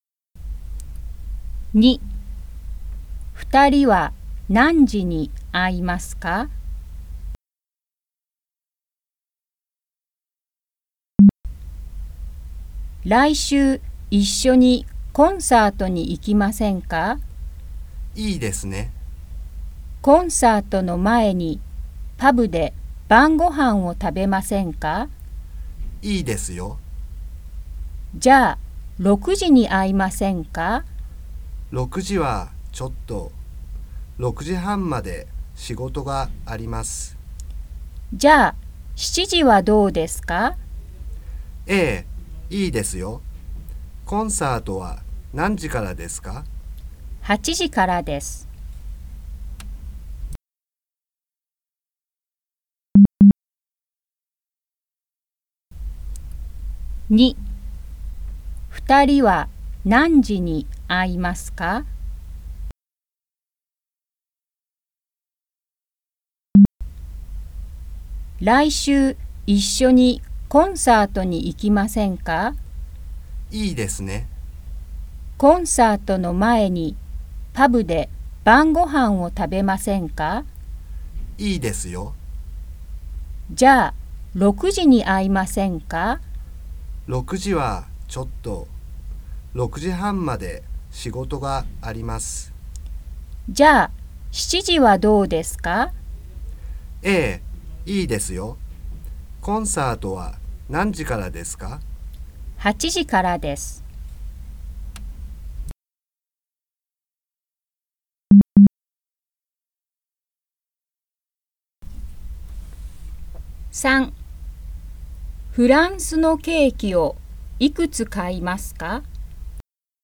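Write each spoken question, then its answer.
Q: 二人は何時に会いますか?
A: 7時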